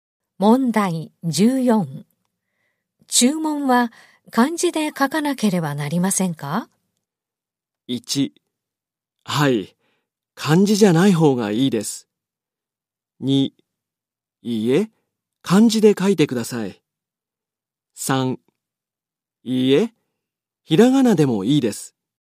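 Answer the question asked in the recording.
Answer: 3: いいえ、ひらがなでもいいです。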